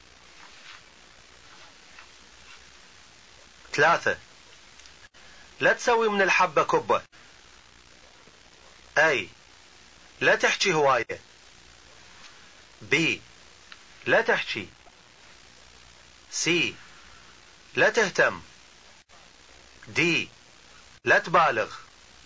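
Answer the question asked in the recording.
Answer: D: لا تبالغ.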